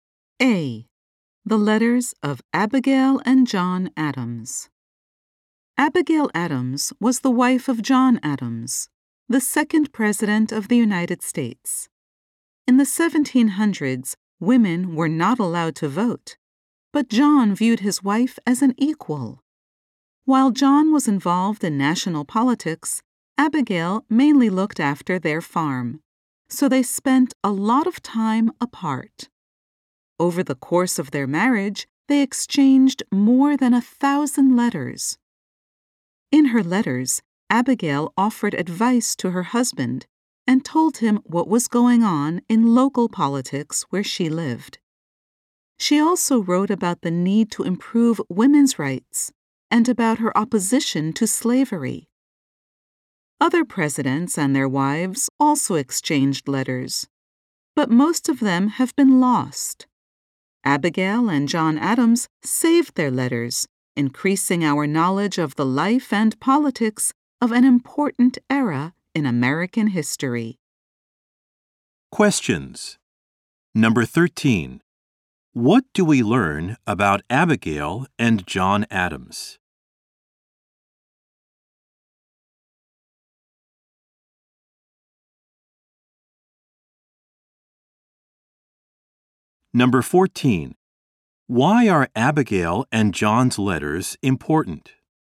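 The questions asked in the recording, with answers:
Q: What do we learn about Abigail and John Adams?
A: They spent a lot of time apart and exchanged over 1,000 letters

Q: Why are Abigail and John's letters important?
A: They increase our knowledge of the life and politics of an important era in American history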